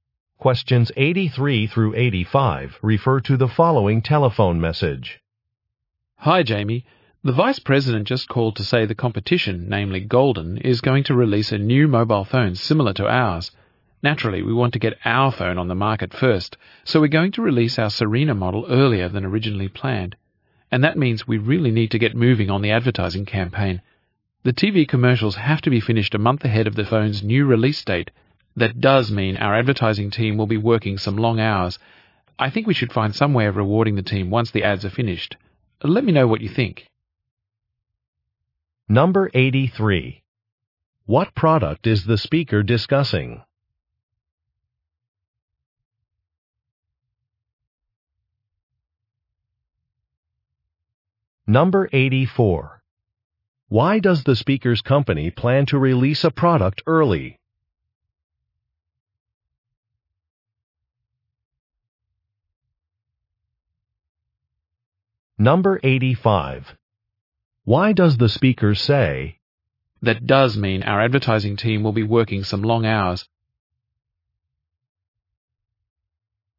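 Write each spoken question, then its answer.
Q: What product is the speaker discussing?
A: A mobile phone

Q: Why does the speaker's company plan to release a product early?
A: A competitor is releasing a similar phone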